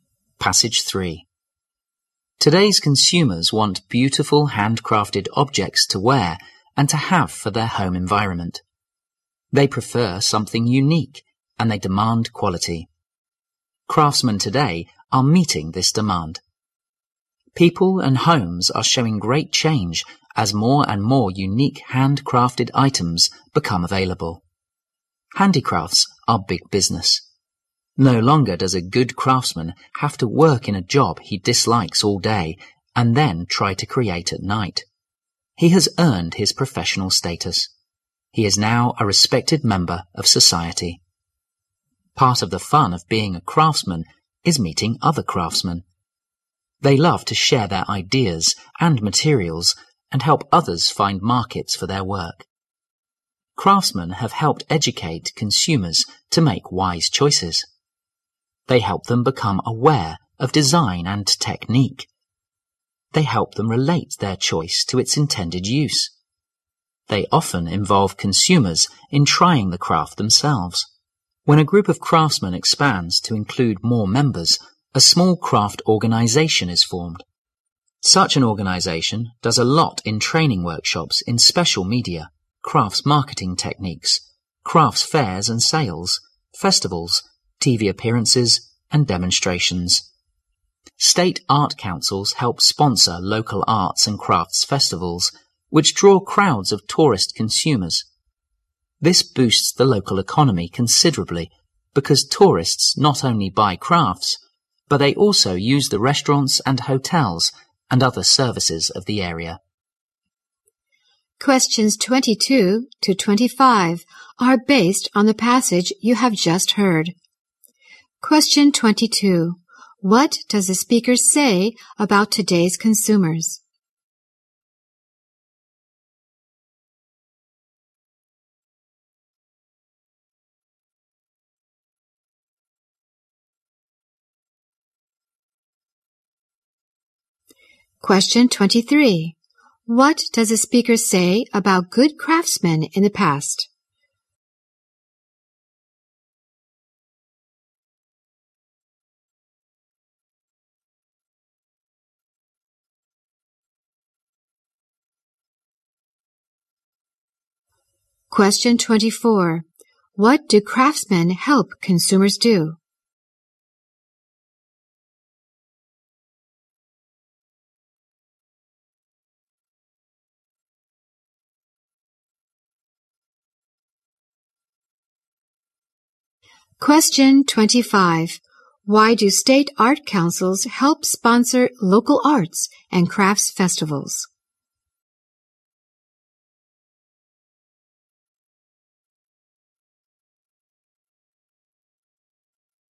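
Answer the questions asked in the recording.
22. They want unique, quality handcrafted items
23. They worked in jobs they disliked and created at night
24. Make wise choices
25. To boost the local economy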